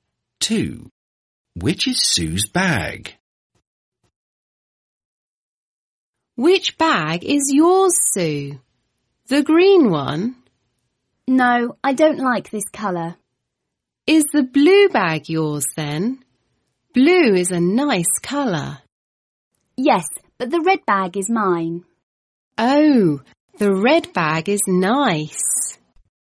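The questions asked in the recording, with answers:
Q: Which is Sue's bag?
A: the red bag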